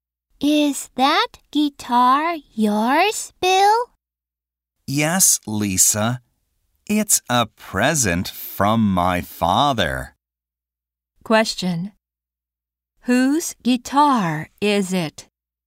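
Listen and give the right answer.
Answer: Bill's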